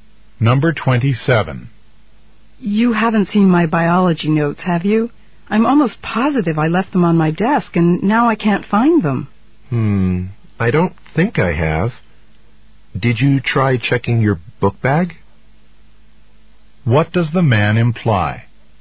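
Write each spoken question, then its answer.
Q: What does the man imply?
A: The notes might be in her book bag.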